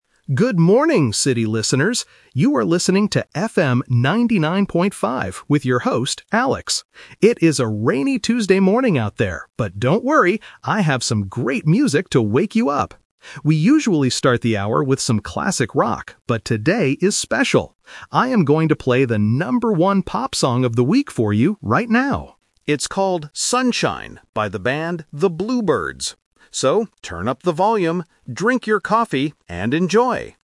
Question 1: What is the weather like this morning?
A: Rainy.

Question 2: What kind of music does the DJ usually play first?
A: Classic rock.

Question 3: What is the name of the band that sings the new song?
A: The Blue Birds.

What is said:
DJ: Good morning, city listeners! You are listening to FM 99.5 with your host, Alex. It is a rainy Tuesday morning out there, but don't worry, I have some great music to wake you up! We usually start the hour with some classic rock, but today is special. I am going to play the number one pop song of the week for you right now. It's called "Sunshine" by the band The Blue Birds. So, turn up the volume, drink your coffee, and enjoy!